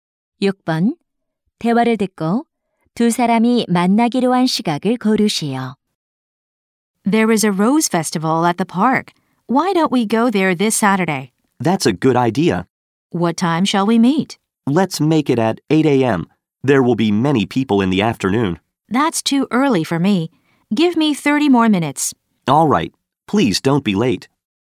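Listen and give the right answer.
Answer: 오전 8시 30분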